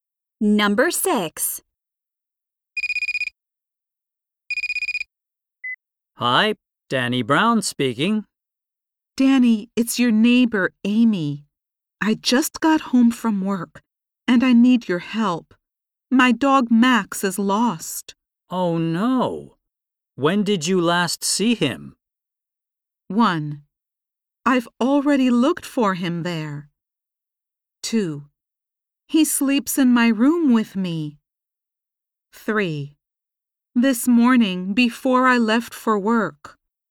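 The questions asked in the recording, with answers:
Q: Oh, no. When did you last see him?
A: 3: This morning, before I left for work.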